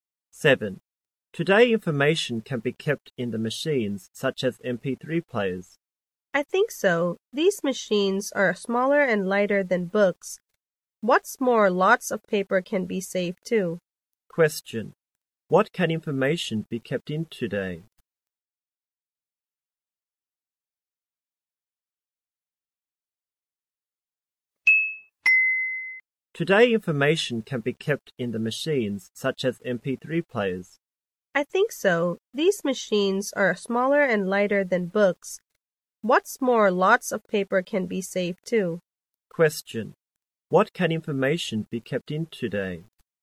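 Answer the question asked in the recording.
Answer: Machines, such as MP3 players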